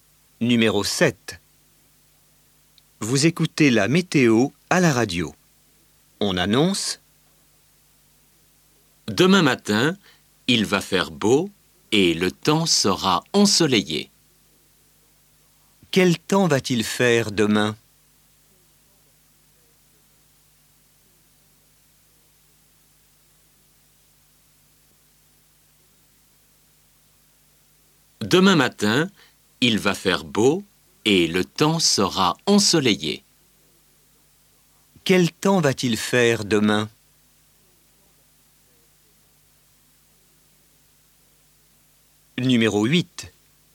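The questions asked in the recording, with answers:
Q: Quel temps va-t-il faire demain ?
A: Beau et ensoleillé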